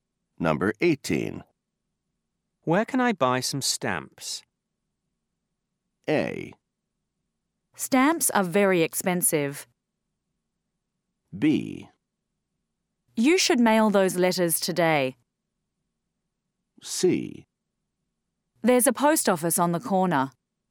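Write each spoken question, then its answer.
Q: Where can I buy some stamps?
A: C: There's a post office on the corner.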